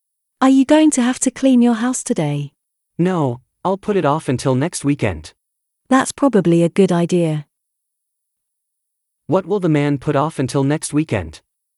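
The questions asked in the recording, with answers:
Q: What will the man put off until next weekend?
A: Cleaning his house.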